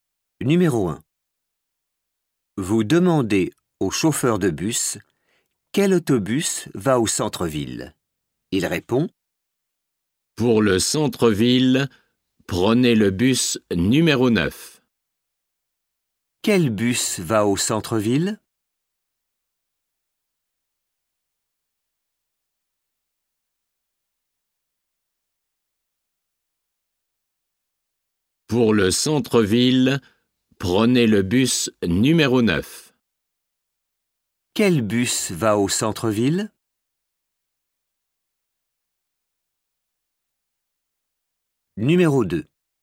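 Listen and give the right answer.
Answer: le bus numéro 9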